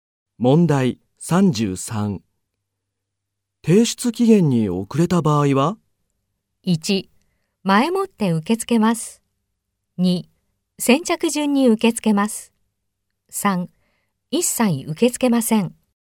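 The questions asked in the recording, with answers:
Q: 提出期限に遅れた場合は?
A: 3: 一切受け付けません。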